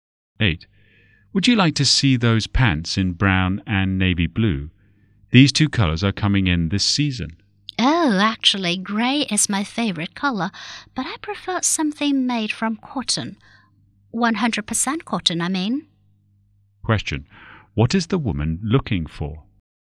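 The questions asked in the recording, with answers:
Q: What is the woman looking for?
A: Grey pants made of 100% cotton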